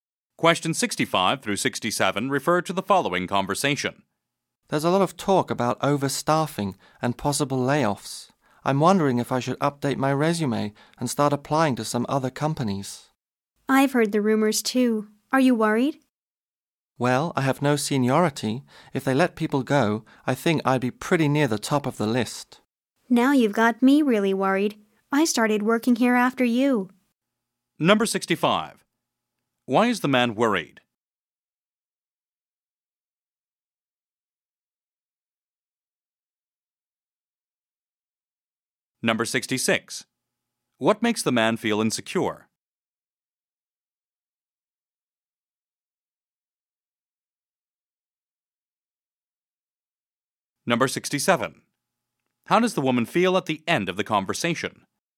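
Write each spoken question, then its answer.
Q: Why is the man worried?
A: There may be layoffs

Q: What makes the man feel insecure?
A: He has no seniority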